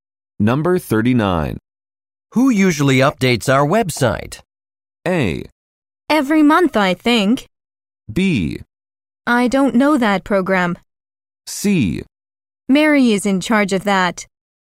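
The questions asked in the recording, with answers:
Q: Who usually updates our website?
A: C: Mary is in charge of that.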